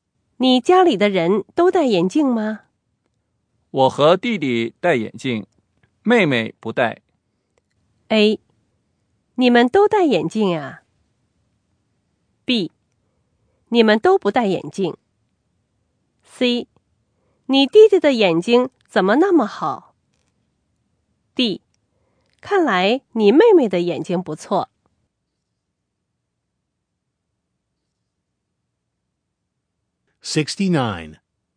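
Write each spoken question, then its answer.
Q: 我和弟弟戴眼镜,妹妹不戴。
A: D: 看来你妹妹的眼睛不错。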